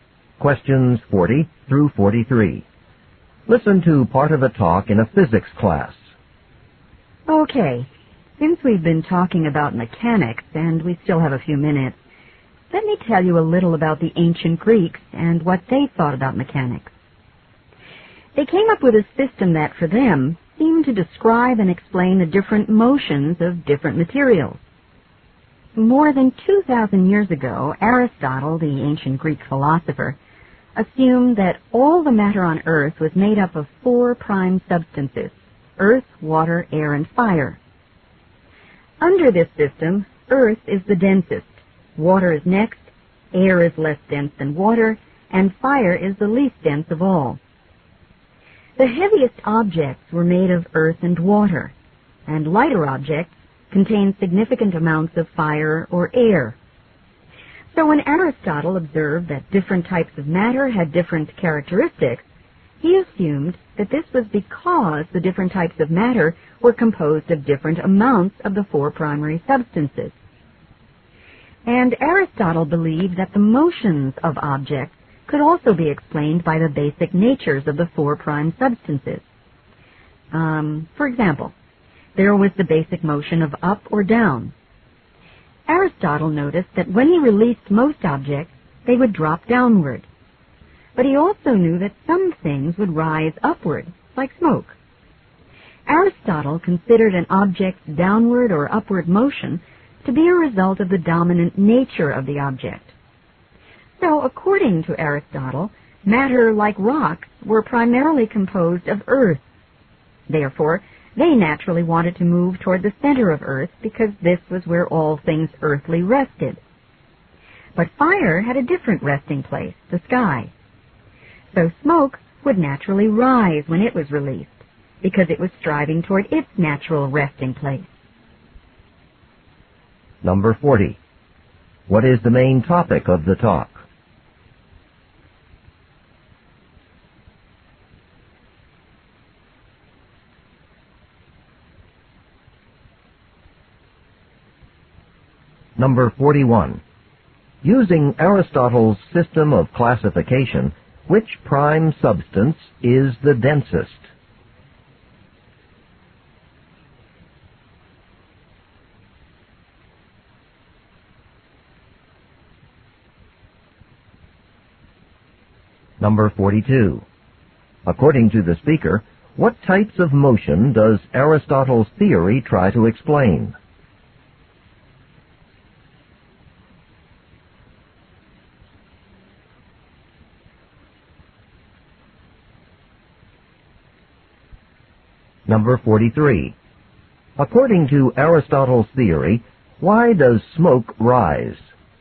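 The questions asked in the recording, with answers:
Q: What is the main topic of the talk?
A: Aristotle's ideas about matter and motion.

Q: Using Aristotle's system of classification, which prime substance is the densest?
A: Earth.

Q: According to the speaker, what types of motion does Aristotle's theory try to explain?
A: Upward and downward motion.

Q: According to Aristotle's theory, why does smoke rise?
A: It moves toward its natural resting place, the sky.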